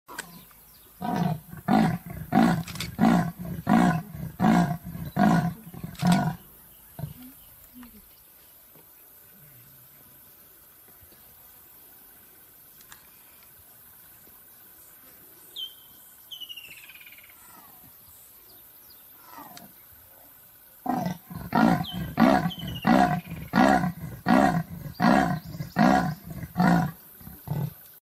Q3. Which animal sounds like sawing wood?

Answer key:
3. Leopard!

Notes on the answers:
These elusive and solitary cats are usually silent–but their iconic hacksaw roar is hoarse and guttural, intended to show dominance when threatened or mark their territory. Opposing leopards rarely heed these warnings, however, and the noise is often a precursor to battle.